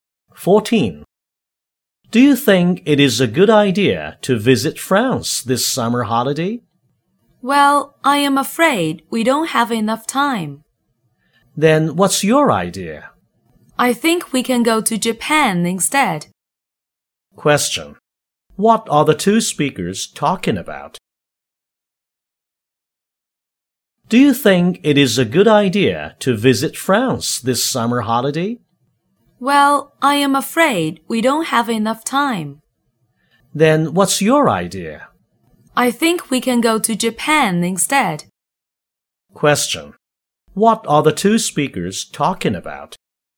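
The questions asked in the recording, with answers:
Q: What are the two speakers talking about?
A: Where to travel this summer holiday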